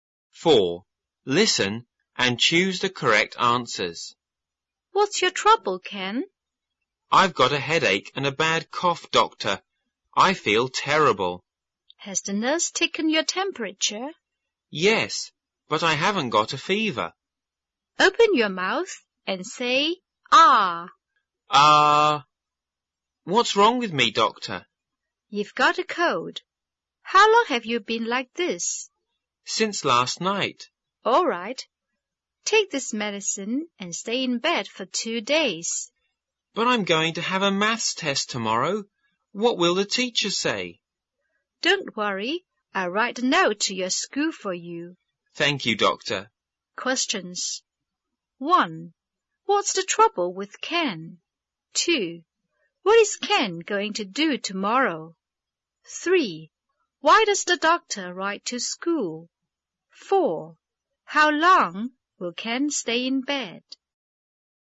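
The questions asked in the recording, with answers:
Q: What's the trouble with Ken?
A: He has a headache and a bad cough (a cold).

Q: What is Ken going to do tomorrow?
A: Have a maths test.

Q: Why does the doctor write to school?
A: Because Ken must stay in bed and will miss his maths test.

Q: How long will Ken stay in bed?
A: For 2 days.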